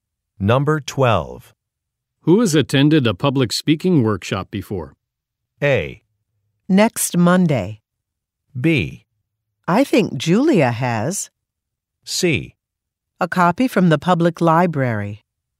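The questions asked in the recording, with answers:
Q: Who has attended a public speaking workshop before?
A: B: I think Julia has.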